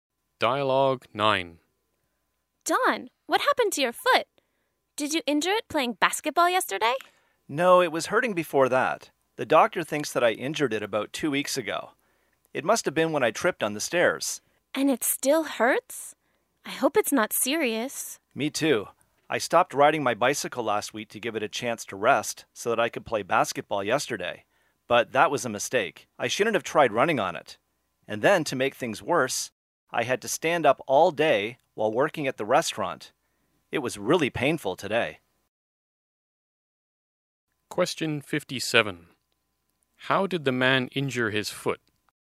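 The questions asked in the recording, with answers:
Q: How did the man injure his foot?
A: He tripped on the stairs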